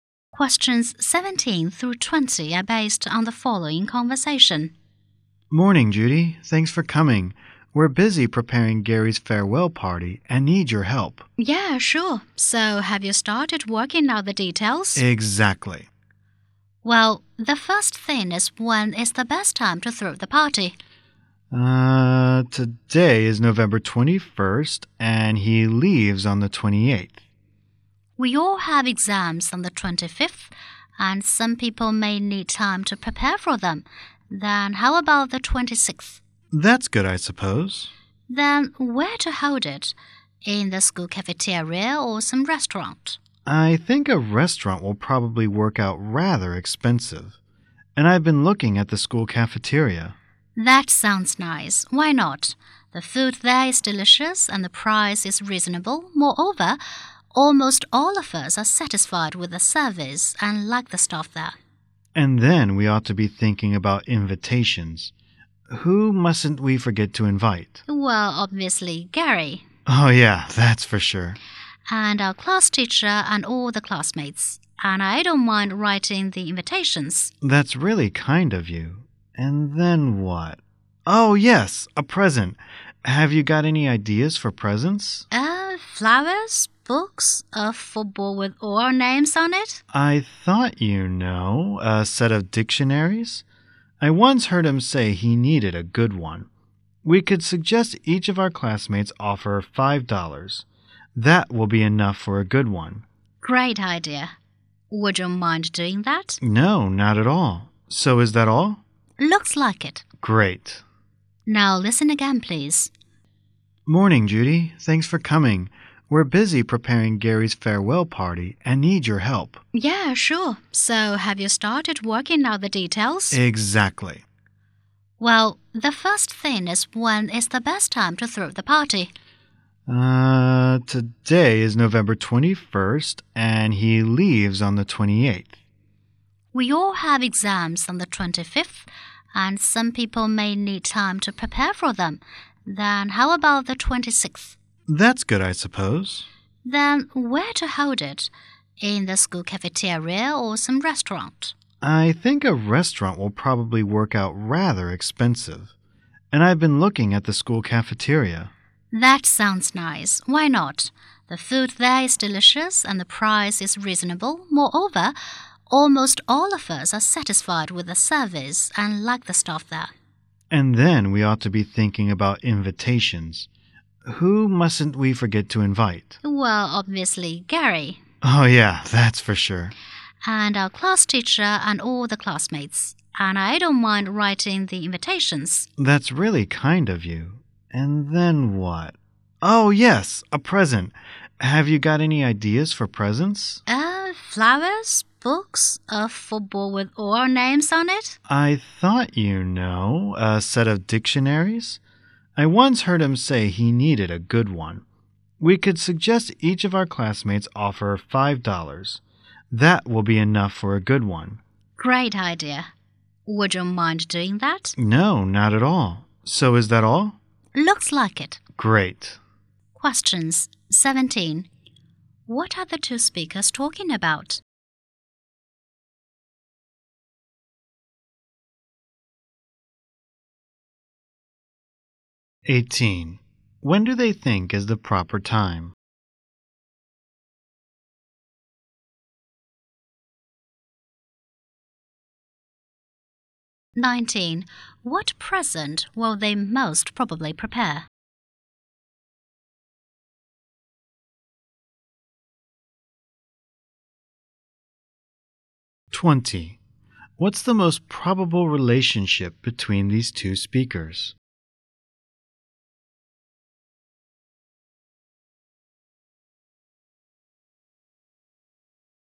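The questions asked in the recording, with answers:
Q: What are the two speakers talking about?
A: Preparing Gary's farewell party

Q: When do they think is the proper time?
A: November 26th

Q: What present will they most probably prepare?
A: A set of dictionaries

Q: What's the most probable relationship between these two speakers?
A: Classmates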